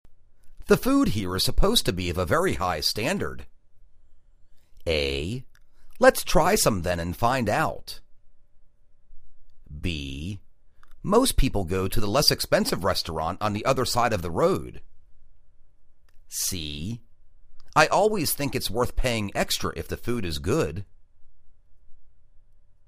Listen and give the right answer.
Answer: Let's try some then and find out.